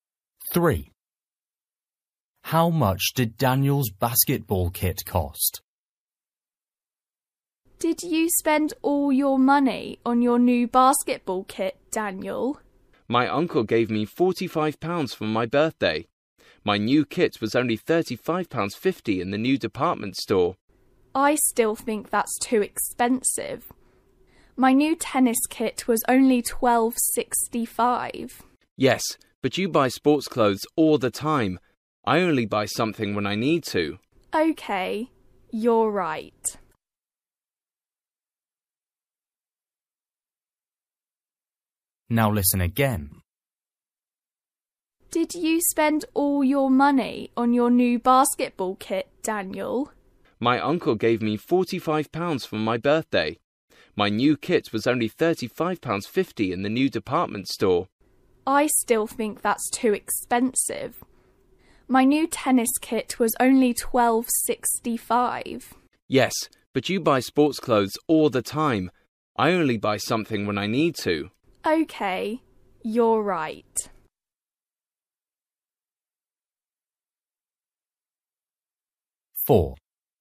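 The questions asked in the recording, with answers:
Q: How much did Daniel's basketball kit cost?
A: £35.50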